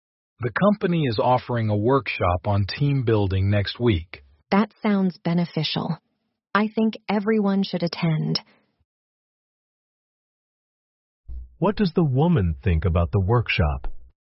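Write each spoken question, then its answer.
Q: What does the woman think about the workshop?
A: It's beneficial and everyone should attend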